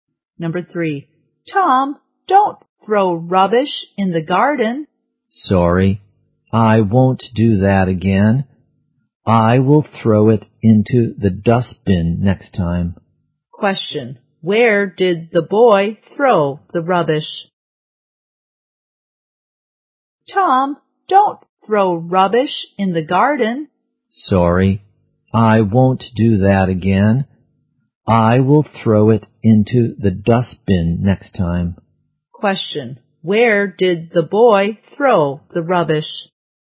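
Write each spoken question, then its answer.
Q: where did the boy throw the rubbish?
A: In the garden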